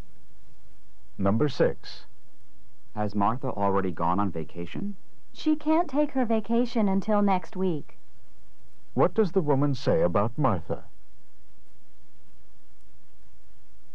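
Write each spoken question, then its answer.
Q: What does the woman say about Martha?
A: She hasn't gone yet; she will go next week.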